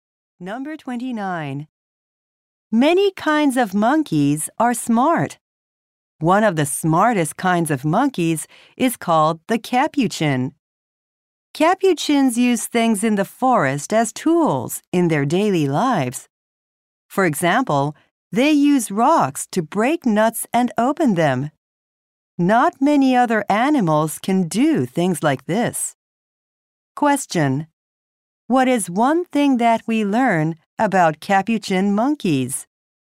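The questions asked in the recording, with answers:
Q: What is one thing that we learn about capuchin monkeys?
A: They use rocks as tools to break nuts.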